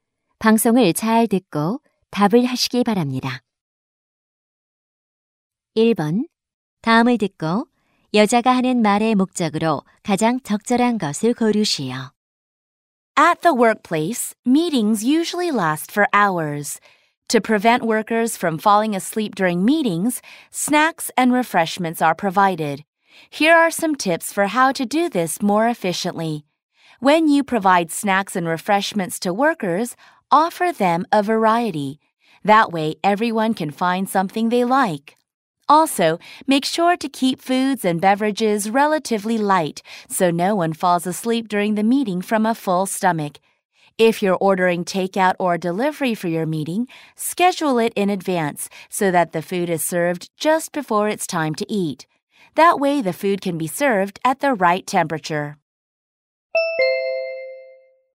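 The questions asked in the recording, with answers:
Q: 다음을 듣고 여자가 하는 말의 목적으로 가장 적절한 것을 고르시오.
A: 회의 때 간식과 음료를 효율적으로 제공하는 방법을 알려주려고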